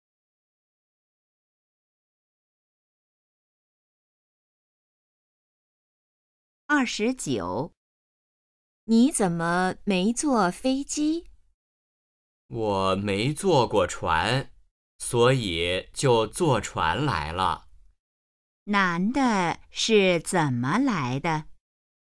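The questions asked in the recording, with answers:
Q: 男的是怎么来的?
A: 坐船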